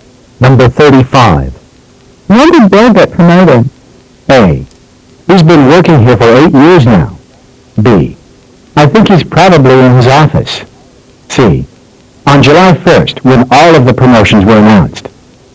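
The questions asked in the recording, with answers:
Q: When did Bill get promoted?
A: C: On July 1st, when all of the promotions were announced.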